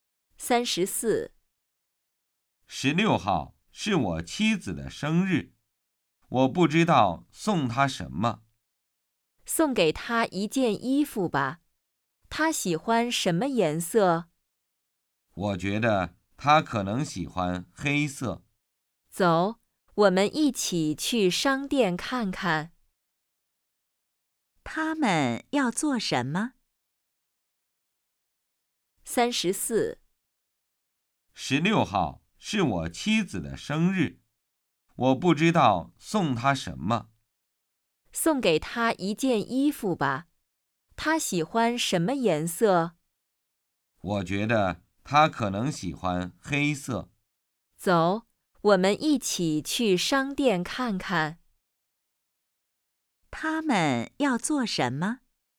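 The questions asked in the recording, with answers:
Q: 他们要做什么?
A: 去商店买衣服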